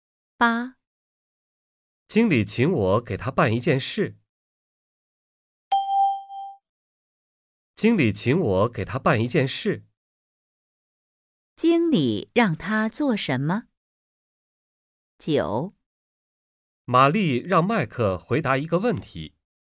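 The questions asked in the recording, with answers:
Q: 经理让他做什么?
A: 给经理办一件事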